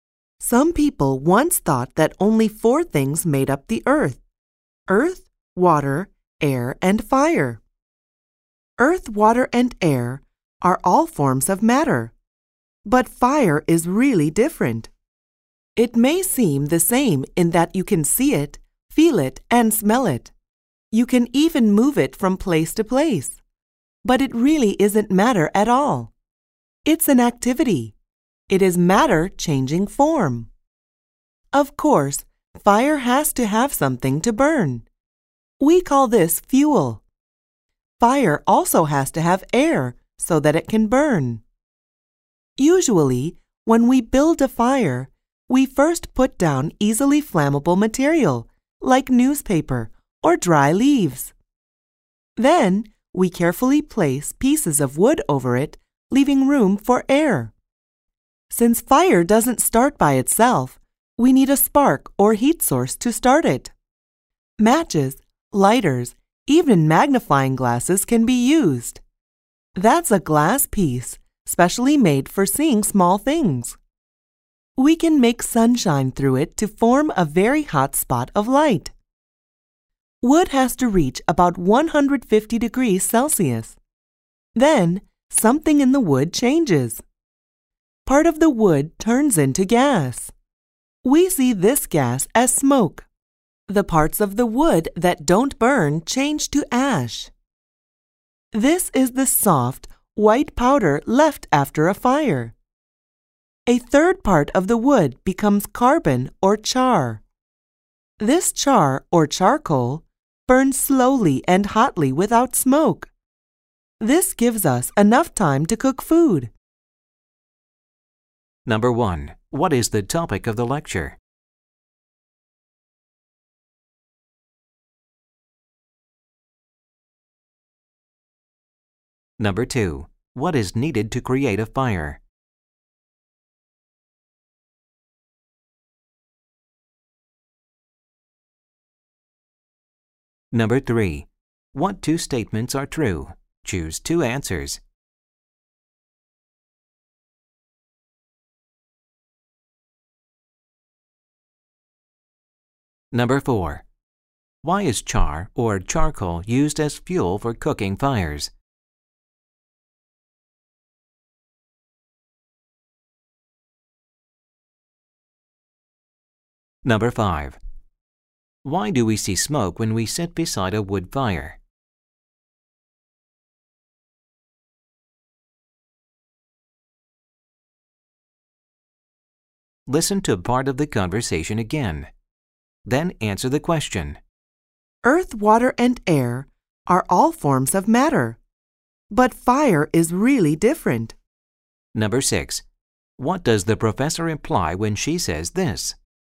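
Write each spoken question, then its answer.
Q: What is the topic of the lecture?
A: Fire: how it burns and what it needs

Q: What is needed to create a fire?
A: Fuel, air, and a spark or heat source

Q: Why is char or charcoal used as fuel for cooking fires?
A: It burns slowly and hotly without smoke, giving enough time to cook

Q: Why do we see smoke when we sit beside a wood fire?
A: Part of the wood turns into gas, which we see as smoke

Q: What does the professor imply when she says this?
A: Fire is not matter; it is an activity, matter changing form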